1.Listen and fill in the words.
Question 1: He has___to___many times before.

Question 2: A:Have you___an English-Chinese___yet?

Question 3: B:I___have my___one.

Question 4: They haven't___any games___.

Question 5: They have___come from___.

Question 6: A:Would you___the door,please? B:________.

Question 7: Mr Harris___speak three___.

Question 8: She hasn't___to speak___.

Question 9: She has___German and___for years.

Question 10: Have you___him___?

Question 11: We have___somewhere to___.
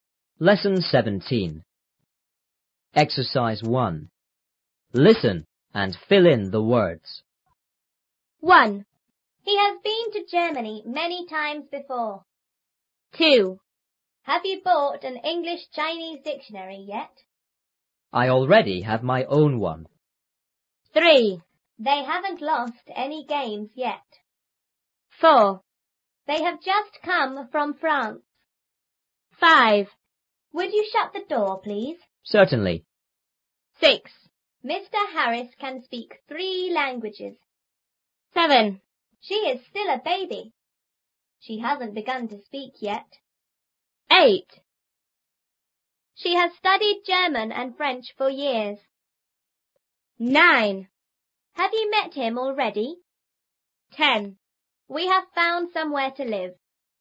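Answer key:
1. been; Germany
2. bought; dictionary
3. already; own
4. lost; yet
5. just; France
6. shut; Certainly
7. can; languages
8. begun; yet
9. studied; French
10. met; already
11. found; live

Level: 初中英语广州版3B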